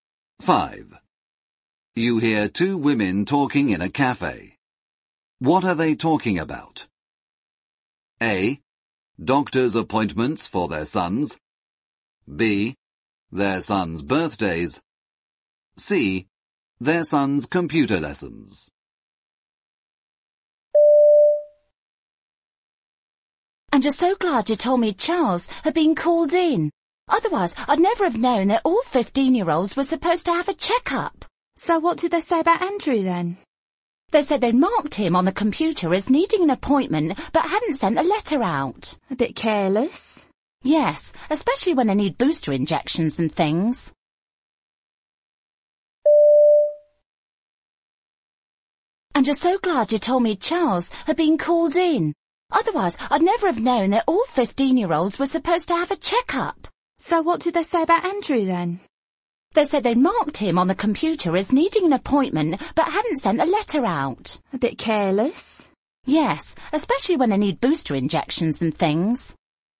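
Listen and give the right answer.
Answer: A: Doctor's appointments for their sons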